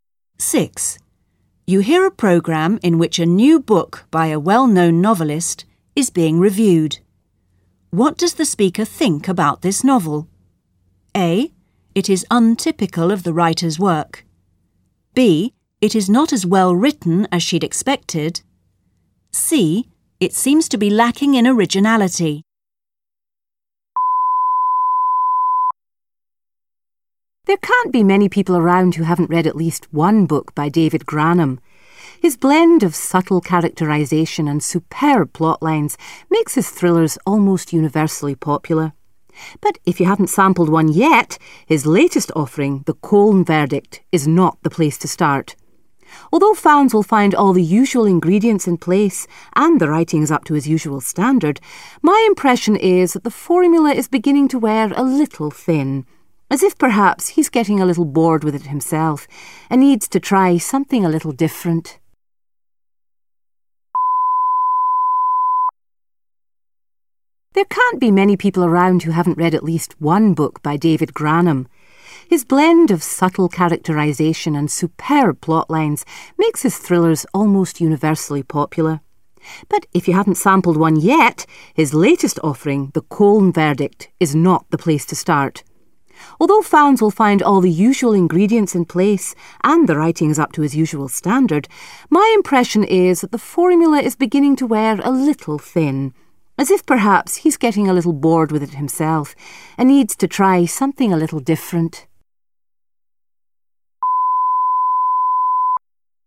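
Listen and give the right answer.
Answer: C: It seems to be lacking in originality.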